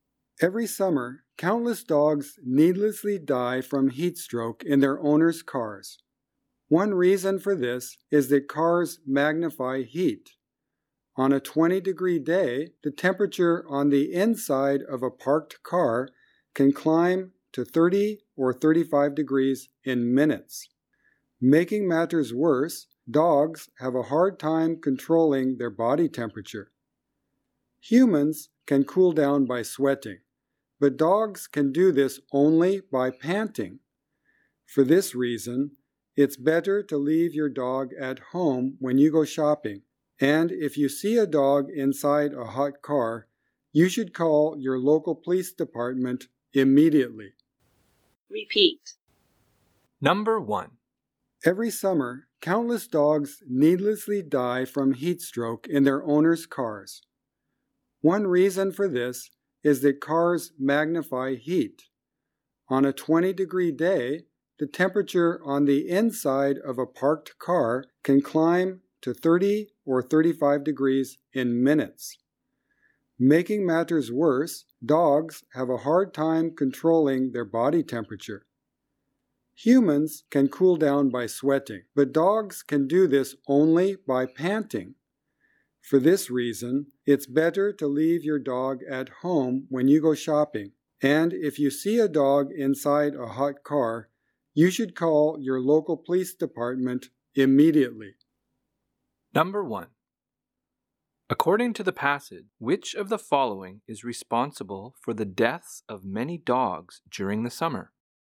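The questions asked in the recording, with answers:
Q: According to the passage, which of the following is responsible for the deaths of many dogs during the summer?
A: Heat stroke from being left in cars, which get very hot inside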